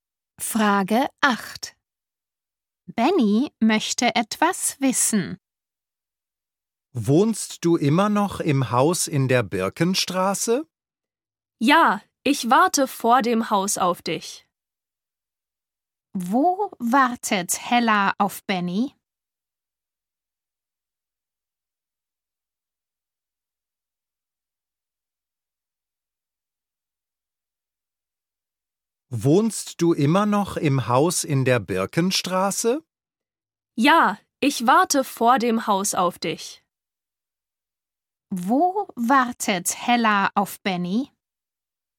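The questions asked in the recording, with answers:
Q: Wo wartet Hella auf Benny?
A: Vor dem Haus (in der Birkenstraße)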